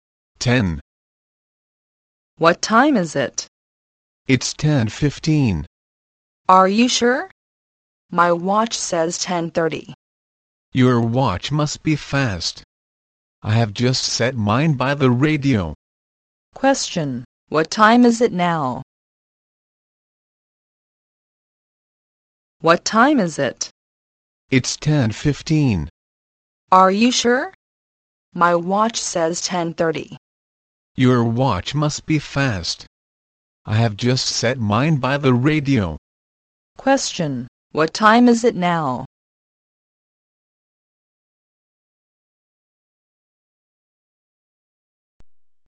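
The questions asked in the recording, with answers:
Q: Question: What time is it now?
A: 10:15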